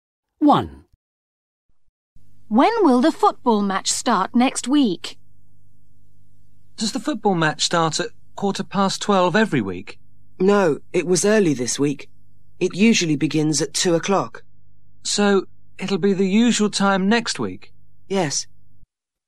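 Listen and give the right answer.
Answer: At 2:00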